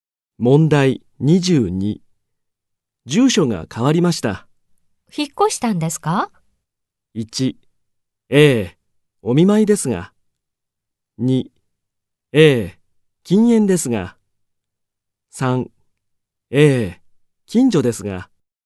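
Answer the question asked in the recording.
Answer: 3: ええ、近所ですが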